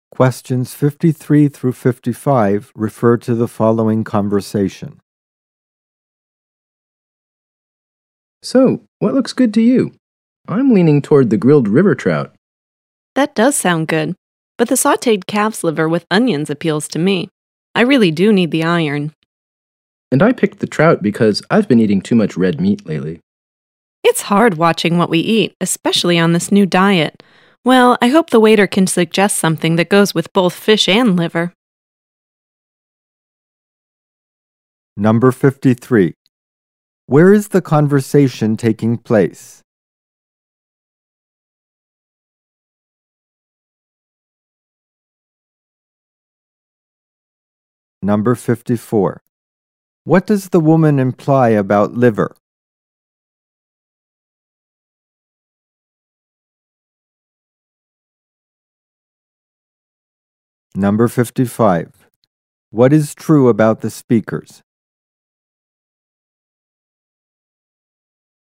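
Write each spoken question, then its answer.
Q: Where is the conversation taking place?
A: At a restaurant

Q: What does the woman imply about liver?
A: It is a good source of iron

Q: What is true about the speakers?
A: They are on a new diet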